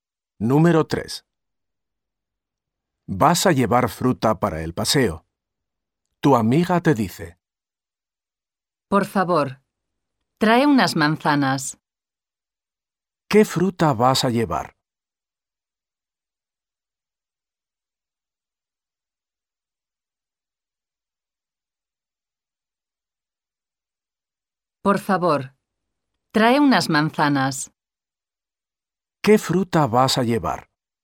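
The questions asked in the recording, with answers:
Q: ¿Qué fruta vas a llevar?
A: Manzanas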